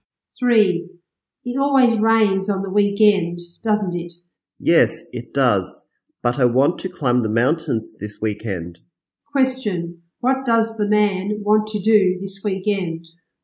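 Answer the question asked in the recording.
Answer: Climb the mountains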